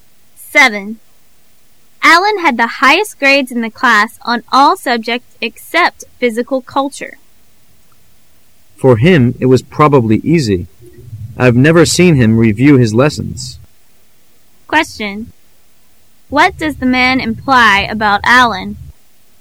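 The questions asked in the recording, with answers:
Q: What does the man imply about Alan?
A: Studying is easy for him; he never reviews his lessons

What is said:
[解析] W: Allan had the highest grades in the class on all subjects except physical culture. M: For him it was probably easy. I've never seen him review his lessons. Q: What does the man imply about Allan?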